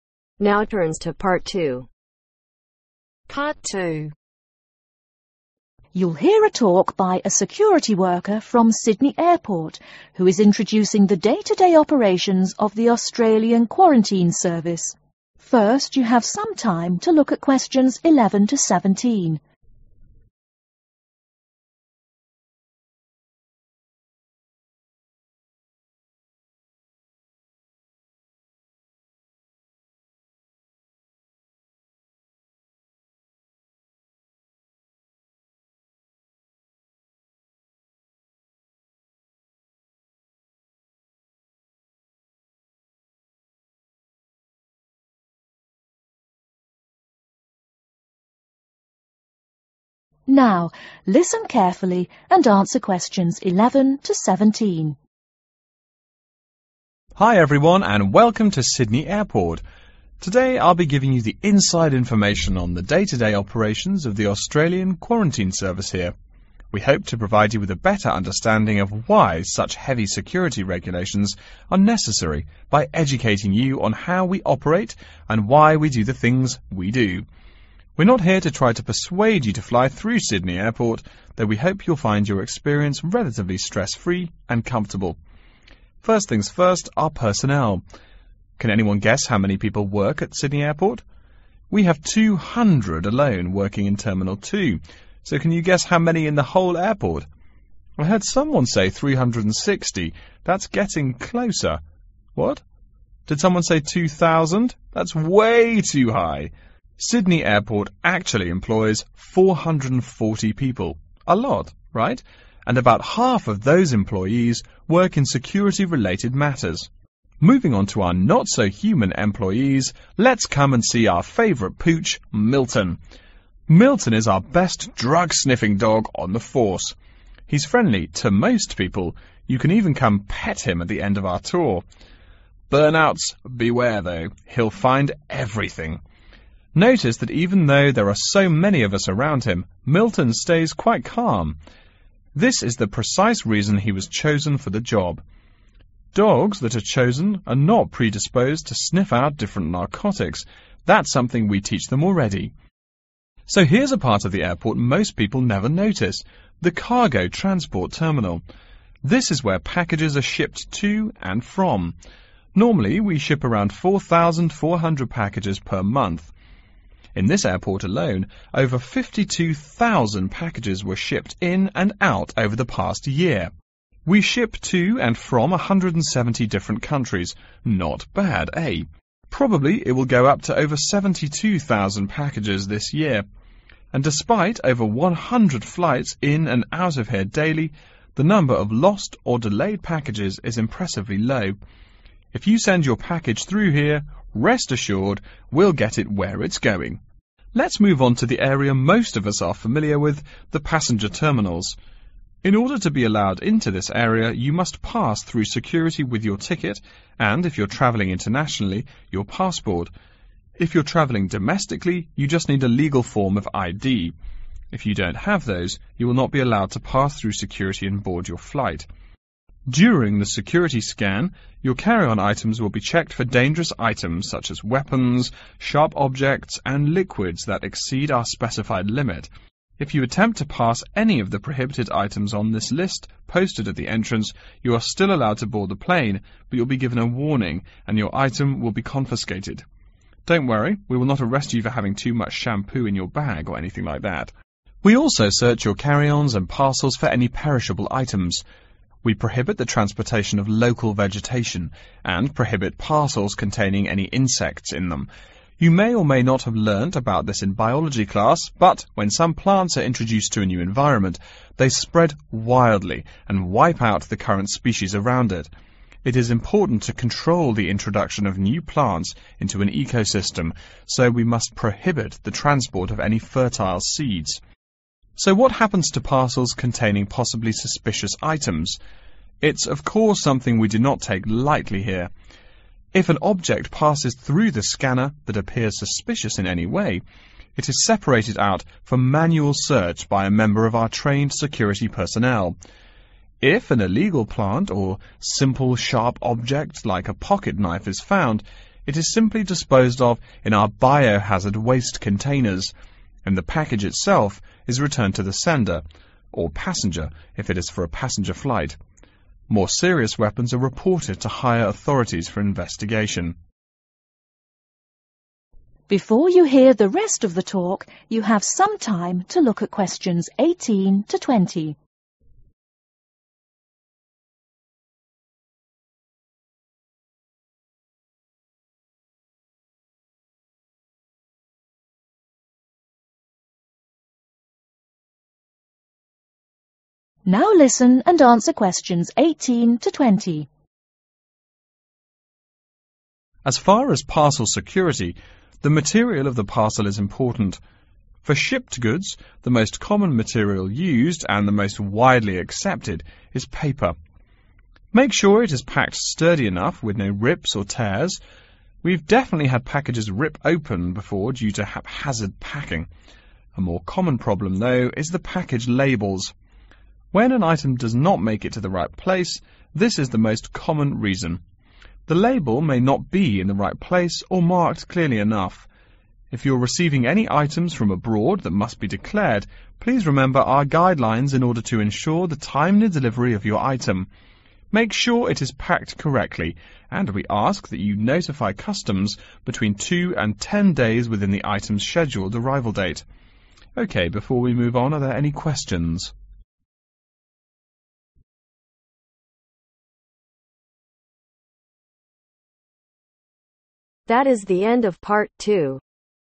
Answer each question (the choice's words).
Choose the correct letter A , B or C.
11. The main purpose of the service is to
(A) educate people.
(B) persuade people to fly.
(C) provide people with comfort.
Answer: educate people.

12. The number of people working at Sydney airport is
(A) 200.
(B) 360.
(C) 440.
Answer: 440.

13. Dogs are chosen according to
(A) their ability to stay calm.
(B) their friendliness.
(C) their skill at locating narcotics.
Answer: their ability to stay calm.

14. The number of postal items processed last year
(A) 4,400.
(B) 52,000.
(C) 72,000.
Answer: 52,000.

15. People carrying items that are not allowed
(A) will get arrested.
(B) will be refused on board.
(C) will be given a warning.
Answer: will be given a warning.

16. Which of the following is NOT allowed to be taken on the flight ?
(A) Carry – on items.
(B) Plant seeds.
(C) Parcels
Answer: Plant seeds.

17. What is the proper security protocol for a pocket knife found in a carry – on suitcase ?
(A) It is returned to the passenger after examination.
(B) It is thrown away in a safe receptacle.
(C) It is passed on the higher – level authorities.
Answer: It is thrown away in a safe receptacle.

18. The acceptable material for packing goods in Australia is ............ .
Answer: Paper

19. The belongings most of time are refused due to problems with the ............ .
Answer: Package labels

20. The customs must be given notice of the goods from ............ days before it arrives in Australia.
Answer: Two to Ten